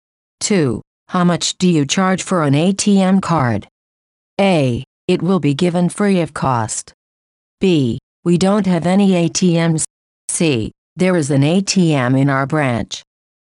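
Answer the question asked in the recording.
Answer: A: It will be given free of cost.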